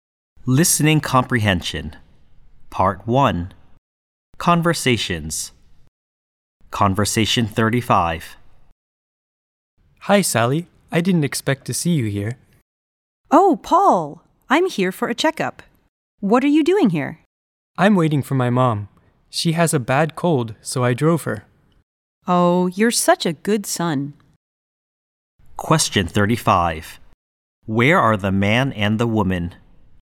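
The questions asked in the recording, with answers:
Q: Where are the man and the woman?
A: At a hospital or doctor's clinic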